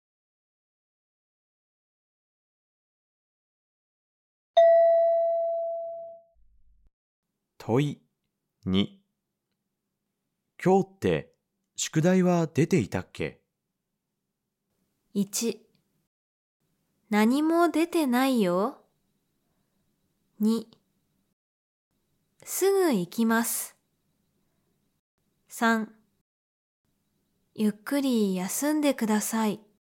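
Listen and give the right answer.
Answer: 1: 何も出てないよ。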